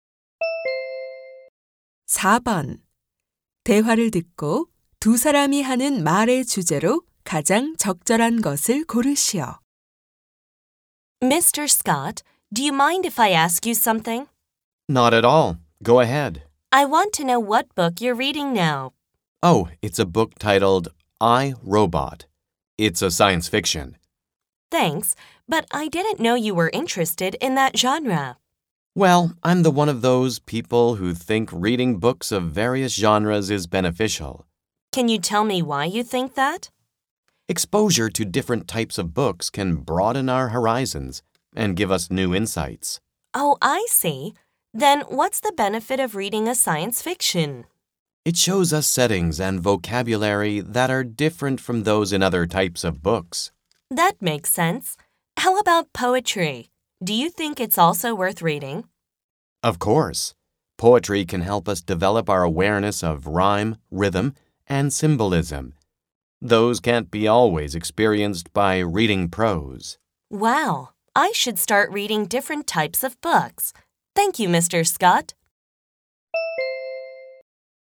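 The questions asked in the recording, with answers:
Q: 대화를 듣고 두 사람이 하는 말의 주제로 가장 적절한 것을 고르시오.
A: 다양한 장르의 책을 읽는 것의 이점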